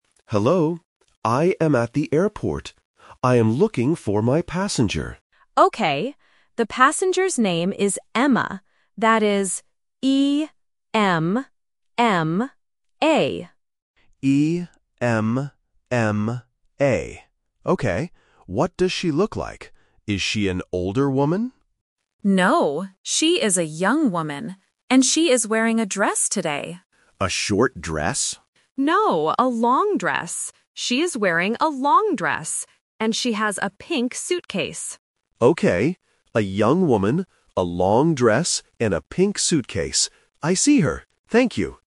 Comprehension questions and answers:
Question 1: How do you spell the passenger's name?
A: E-M-M-A

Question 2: What is the passenger wearing?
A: A long dress

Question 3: What does the passenger have?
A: A pink suitcase

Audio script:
Driver: Hello. I am at the airport. I am looking for my passenger.
Dispatcher: Okay. The passenger's name is Emma. That is E-M-M-A.
Driver: E-M-M-A. Okay. What does she look like? Is she an older woman?
Dispatcher: No, she is a young woman. And she is wearing a dress today.
Driver: A short dress?
She is wearing a long dress. And she has a pink suitcase.
Driver: Okay. A young woman, a long dress, and a pink suitcase. I see her! Thank you.